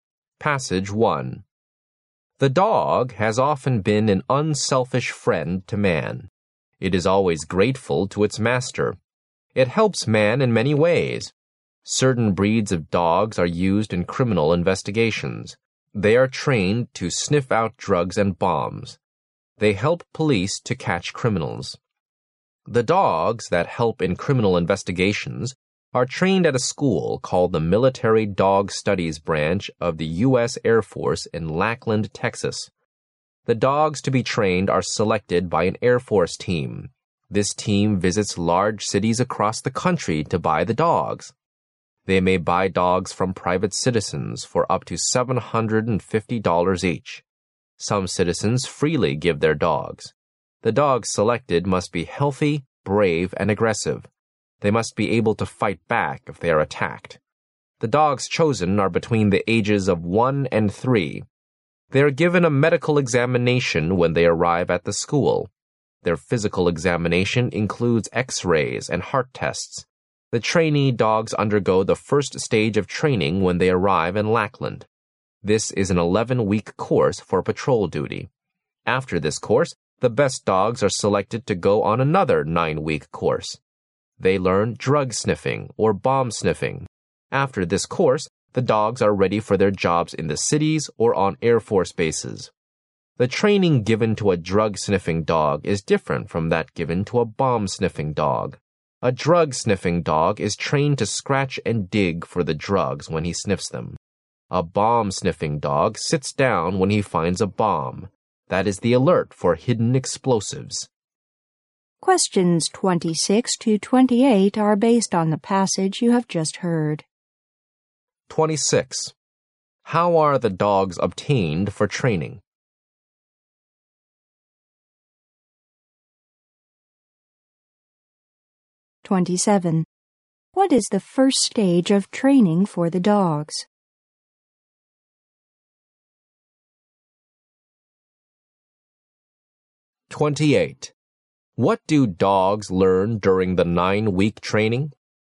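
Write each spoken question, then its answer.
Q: How are the dogs obtained for training?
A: Bought from private citizens or given freely

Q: What is the first stage of training for the dogs?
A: An 11-week course for patrol duty

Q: What do dogs learn during the 9-week training?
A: Drug sniffing or bomb sniffing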